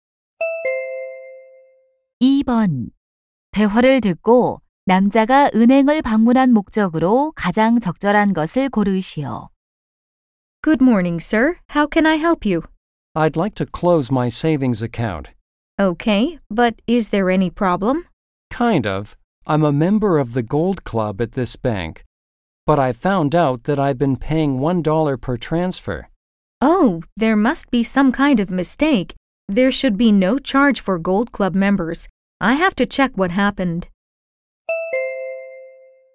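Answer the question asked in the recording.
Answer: 저축 계좌를 해지하려고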